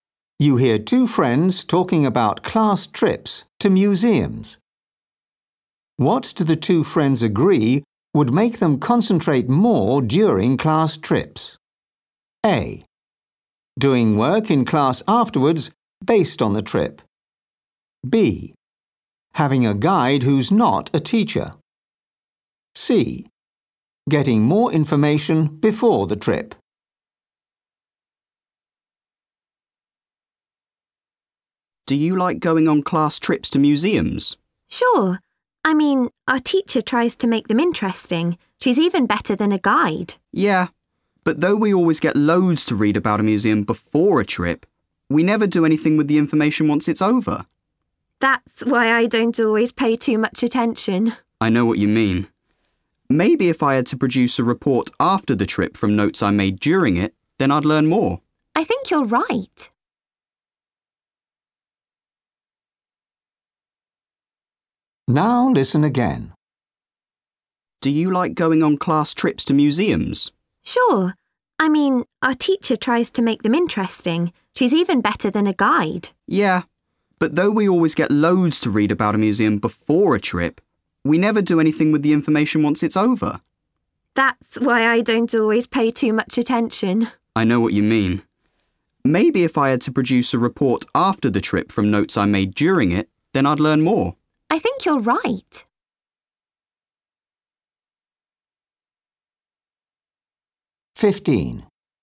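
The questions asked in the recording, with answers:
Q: What do the two friends agree would make them concentrate more during class trips?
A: A: Doing work in class afterwards based on the trip.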